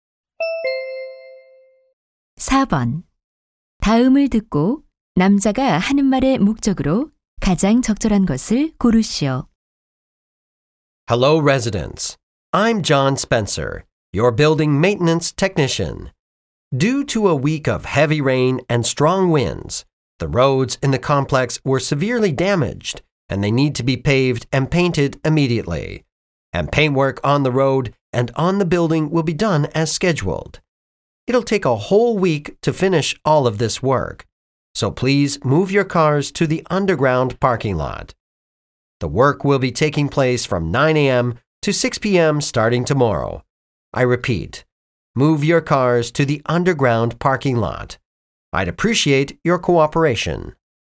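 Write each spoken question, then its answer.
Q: 다음을 듣고 남자가 하는 말의 목적으로 가장 적절한 것을 고르시오.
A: 도로 공사 때문에 차를 지하 주차장으로 옮겨 달라고 요청하려고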